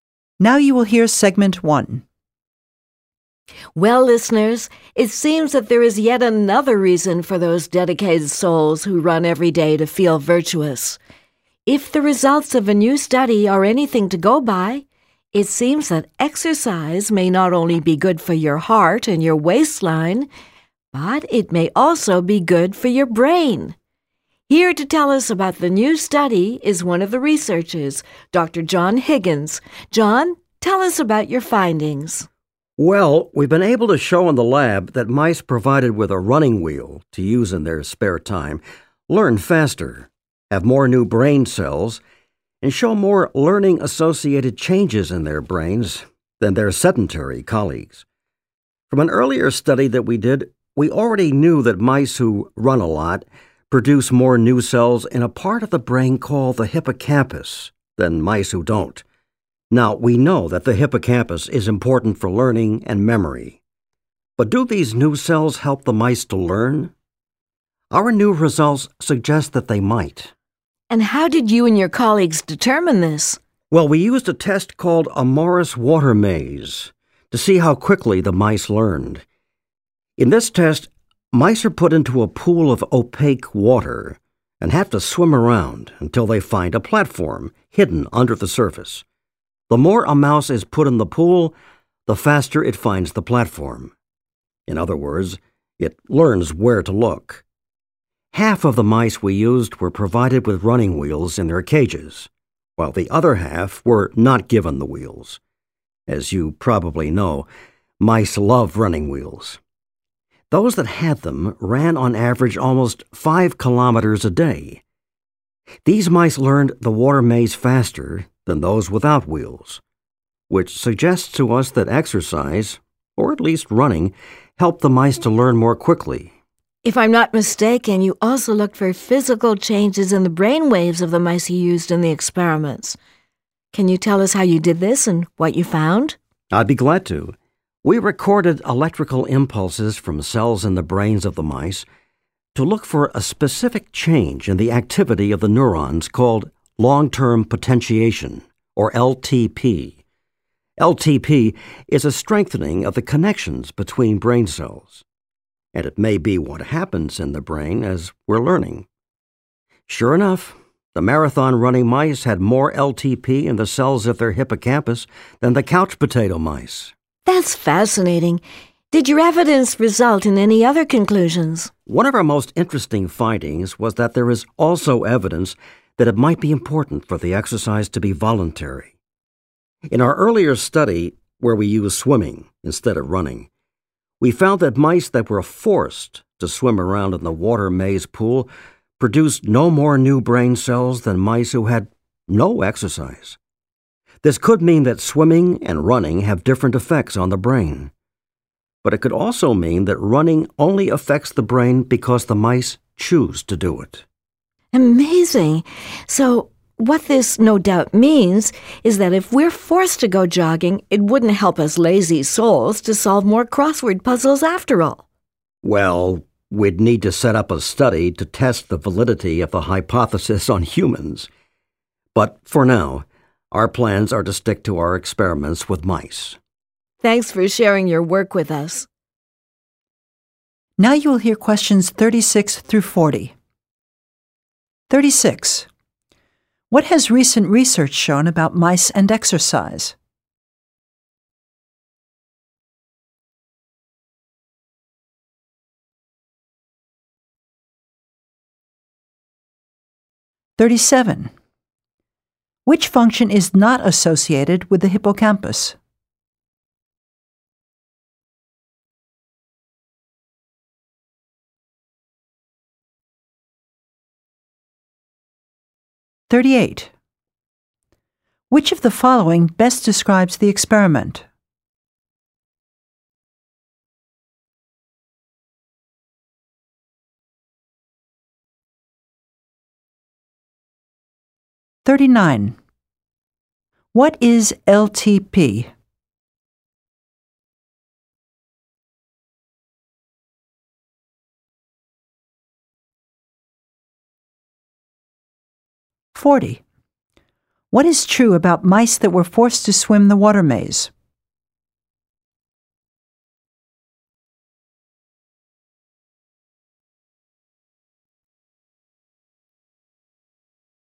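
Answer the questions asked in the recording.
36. Mice that exercise (run) learn faster and grow more new brain cells
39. Long-term potentiation, a strengthening of the connections between brain cells
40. They produced no more new brain cells than mice that had no exercise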